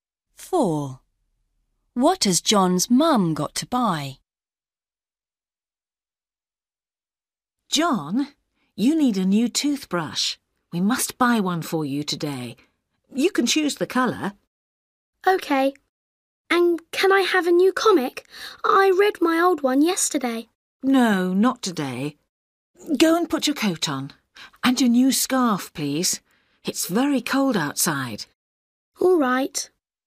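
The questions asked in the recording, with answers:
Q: What has John's mum got to buy?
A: A toothbrush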